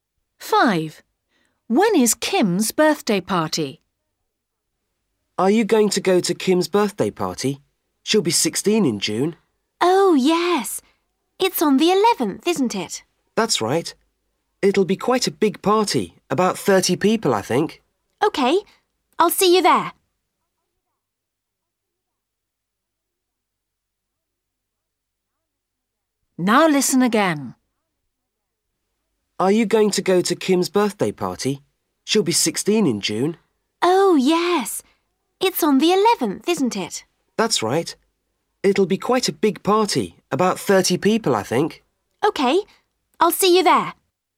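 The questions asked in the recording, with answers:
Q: When is Kim's birthday party?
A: 11th June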